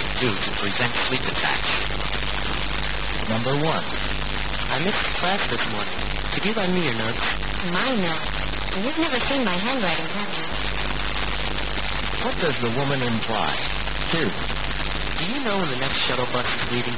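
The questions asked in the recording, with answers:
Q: What does the woman imply?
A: Her handwriting is hard to read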